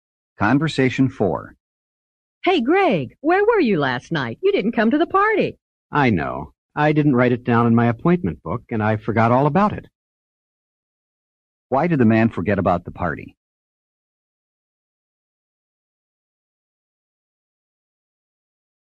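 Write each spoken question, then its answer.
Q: Why did the man forget about the party?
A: He didn't write it in his appointment book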